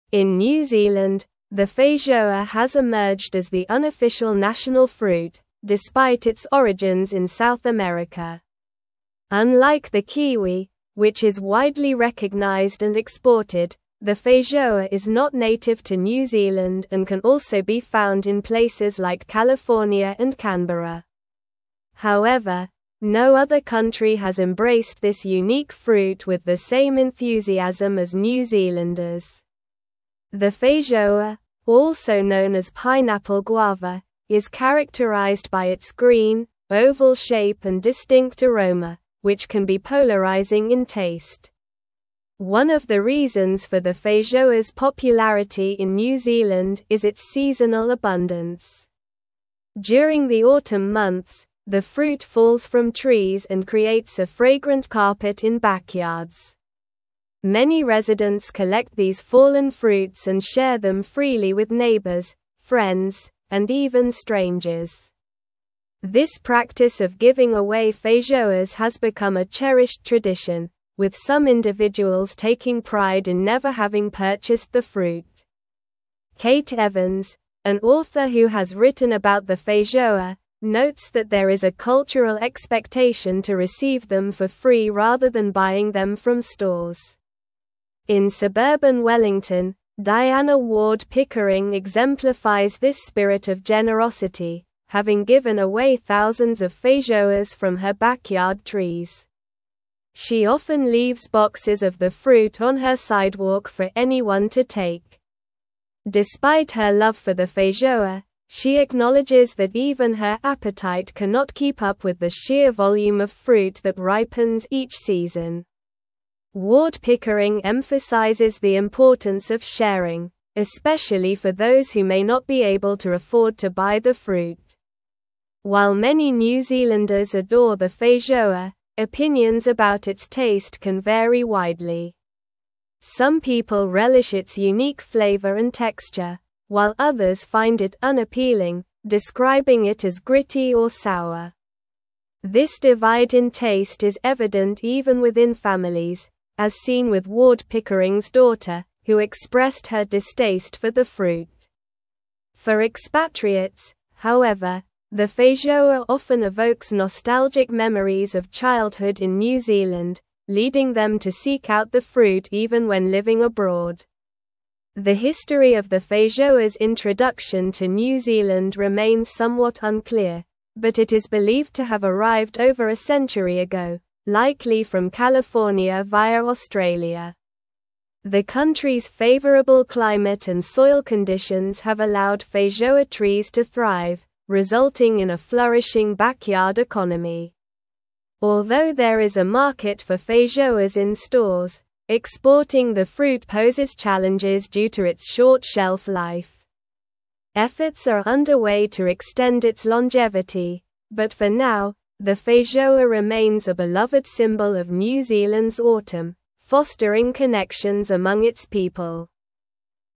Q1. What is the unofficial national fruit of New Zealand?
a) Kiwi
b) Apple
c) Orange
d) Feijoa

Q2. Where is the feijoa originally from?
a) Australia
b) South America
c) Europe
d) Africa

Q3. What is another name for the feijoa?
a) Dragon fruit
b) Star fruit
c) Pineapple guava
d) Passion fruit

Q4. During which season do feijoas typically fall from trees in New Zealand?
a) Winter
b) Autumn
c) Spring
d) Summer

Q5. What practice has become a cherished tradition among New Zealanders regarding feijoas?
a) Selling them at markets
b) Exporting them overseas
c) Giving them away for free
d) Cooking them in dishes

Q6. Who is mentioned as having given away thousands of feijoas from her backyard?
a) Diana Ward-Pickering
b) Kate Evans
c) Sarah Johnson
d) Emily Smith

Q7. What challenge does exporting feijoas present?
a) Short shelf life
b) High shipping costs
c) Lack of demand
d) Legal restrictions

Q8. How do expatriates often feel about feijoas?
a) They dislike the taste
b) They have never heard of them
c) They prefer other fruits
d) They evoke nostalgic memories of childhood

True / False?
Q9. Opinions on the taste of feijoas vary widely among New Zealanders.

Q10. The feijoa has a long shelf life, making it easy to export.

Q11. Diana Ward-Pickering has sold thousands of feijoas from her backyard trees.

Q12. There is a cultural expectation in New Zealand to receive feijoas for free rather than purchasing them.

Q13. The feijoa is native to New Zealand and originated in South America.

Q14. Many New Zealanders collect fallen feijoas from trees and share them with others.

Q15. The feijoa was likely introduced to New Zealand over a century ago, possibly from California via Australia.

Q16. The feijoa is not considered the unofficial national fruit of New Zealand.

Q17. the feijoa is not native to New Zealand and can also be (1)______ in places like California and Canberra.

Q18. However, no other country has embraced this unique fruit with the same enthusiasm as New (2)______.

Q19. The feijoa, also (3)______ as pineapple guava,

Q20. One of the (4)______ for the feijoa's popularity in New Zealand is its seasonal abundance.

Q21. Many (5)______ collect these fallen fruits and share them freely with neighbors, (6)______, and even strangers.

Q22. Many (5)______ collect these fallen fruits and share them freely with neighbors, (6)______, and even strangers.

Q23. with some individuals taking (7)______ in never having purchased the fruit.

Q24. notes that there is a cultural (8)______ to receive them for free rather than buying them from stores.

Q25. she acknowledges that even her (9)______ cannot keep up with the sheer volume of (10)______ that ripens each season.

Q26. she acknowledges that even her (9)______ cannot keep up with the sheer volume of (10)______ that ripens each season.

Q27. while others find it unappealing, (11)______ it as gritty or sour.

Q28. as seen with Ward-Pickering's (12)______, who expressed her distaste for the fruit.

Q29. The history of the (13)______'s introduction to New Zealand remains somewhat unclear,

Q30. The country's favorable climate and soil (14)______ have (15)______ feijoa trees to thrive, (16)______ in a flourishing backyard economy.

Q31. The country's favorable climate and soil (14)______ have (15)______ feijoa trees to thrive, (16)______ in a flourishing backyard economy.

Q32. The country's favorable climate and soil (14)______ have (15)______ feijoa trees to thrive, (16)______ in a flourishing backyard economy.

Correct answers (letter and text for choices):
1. d) Feijoa
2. b) South America
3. c) Pineapple guava
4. b) Autumn
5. c) Giving them away for free
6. a) Diana Ward-Pickering
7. a) Short shelf life
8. d) They evoke nostalgic memories of childhood
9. True
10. False
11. False
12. True
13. False
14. True
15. True
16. False
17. found
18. Zealanders
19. known
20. reasons
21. residents
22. friends
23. pride
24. expectation
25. appetite
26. fruit
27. describing
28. daughter
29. feijoa
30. conditions
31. allowed
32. resulting

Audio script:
In New Zealand, the feijoa has emerged as the unofficial national fruit, despite its origins in South America. Unlike the kiwi, which is widely recognized and exported, the feijoa is not native to New Zealand and can also be found in places like California and Canberra. However, no other country has embraced this unique fruit with the same enthusiasm as New Zealanders. The feijoa, also known as pineapple guava, is characterized by its green, oval shape and distinct aroma, which can be polarizing in taste.
One of the reasons for the feijoa's popularity in New Zealand is its seasonal abundance. During the autumn months, the fruit falls from trees and creates a fragrant carpet in backyards. Many residents collect these fallen fruits and share them freely with neighbors, friends, and even strangers. This practice of giving away feijoas has become a cherished tradition, with some individuals taking pride in never having purchased the fruit. Kate Evans, an author who has written about the feijoa, notes that there is a cultural expectation to receive them for free rather than buying them from stores.
In suburban Wellington, Diana Ward-Pickering exemplifies this spirit of generosity, having given away thousands of feijoas from her backyard trees. She often leaves boxes of the fruit on her sidewalk for anyone to take. Despite her love for the feijoa, she acknowledges that even her appetite cannot keep up with the sheer volume of fruit that ripens each season. Ward-Pickering emphasizes the importance of sharing, especially for those who may not be able to afford to buy the fruit.
While many New Zealanders adore the feijoa, opinions about its taste can vary widely. Some people relish its unique flavor and texture, while others find it unappealing, describing it as gritty or sour. This divide in taste is evident even within families, as seen with Ward-Pickering's daughter, who expressed her distaste for the fruit. For expatriates, however, the feijoa often evokes nostalgic memories of childhood in New Zealand, leading them to seek out the fruit even when living abroad.
The history of the feijoa's introduction to New Zealand remains somewhat unclear, but it is believed to have arrived over a century ago, likely from California via Australia. The country's favorable climate and soil conditions have allowed feijoa trees to thrive, resulting in a flourishing backyard economy. Although there is a market for feijoas in stores, exporting the fruit poses challenges due to its short shelf life. Efforts are underway to extend its longevity, but for now, the feijoa remains a beloved symbol of New Zealand's autumn, fostering connections among its people.

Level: Level 4